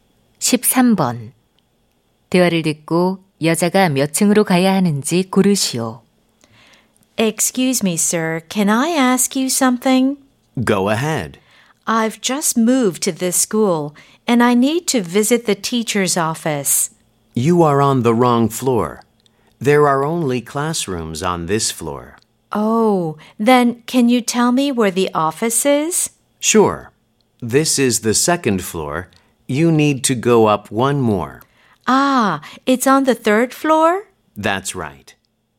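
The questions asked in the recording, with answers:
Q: 대화를 듣고 여자가 몇 층으로 가야 하는지 고르시오.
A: 3층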